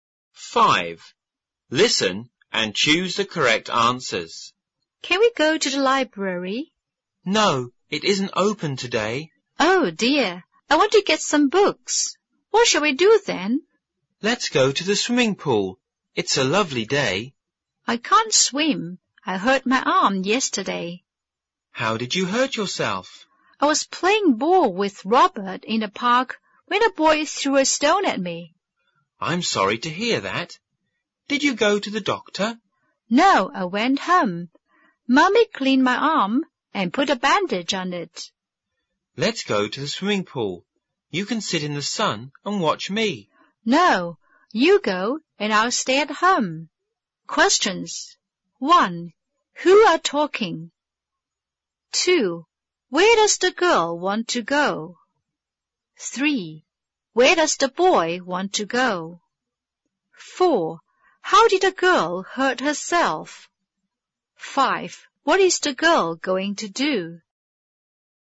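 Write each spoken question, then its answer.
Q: Where does the boy want to go?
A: To the swimming pool

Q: How did a girl hurt herself?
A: A boy threw a stone at her while she was playing ball in a park

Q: What is the girl going to do?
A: Stay at home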